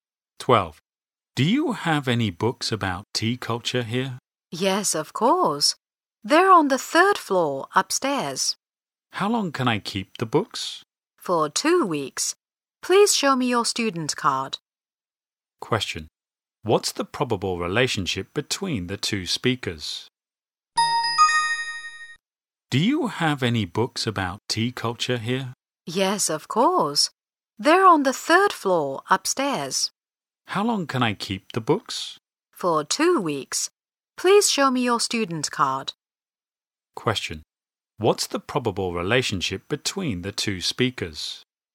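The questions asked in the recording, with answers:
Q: What's the probable relationship between the two speakers?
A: Librarian and student.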